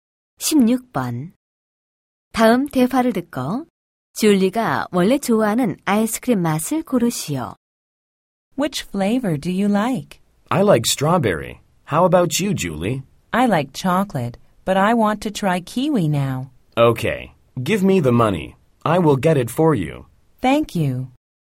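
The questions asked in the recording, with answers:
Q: 다음 대화를 듣고 줄리가 원래 좋아하는 아이스크림 맛을 고르시오.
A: 초콜릿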